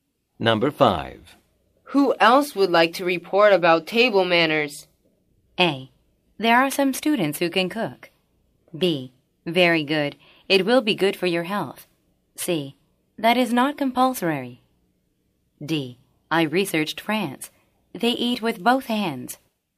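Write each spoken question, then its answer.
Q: Who else would like to report about table manners?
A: D: I researched France. They eat with both hands.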